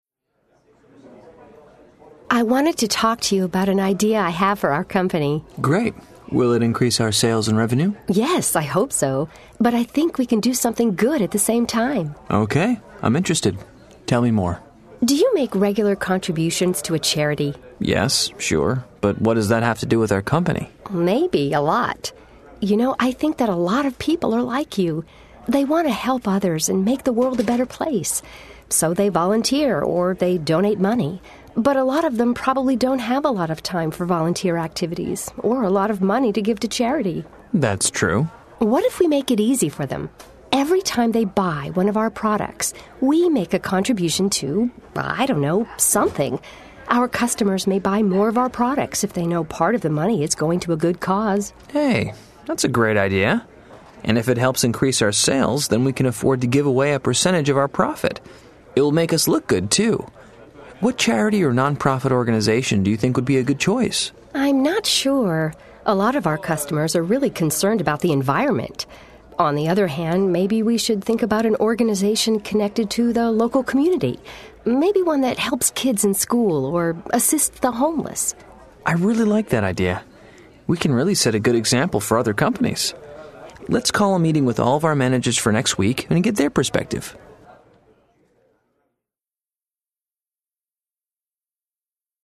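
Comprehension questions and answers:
Listen to the conversation. Then select the correct answers.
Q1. Which statement provides the best summary of the conversation?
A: Ben suggests the company donates to a charity each time a customer buys a product, to help others and increase sales.

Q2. Why does Ben think his plan will encourage customers to buy their products?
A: Customers want to help others but lack time or money, and will buy more if part of the money goes to a good cause.

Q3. What kind of non-profit organization would be the best partner for Ben and Jan's company?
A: A local community organization, such as one that helps kids in school or assists the homeless.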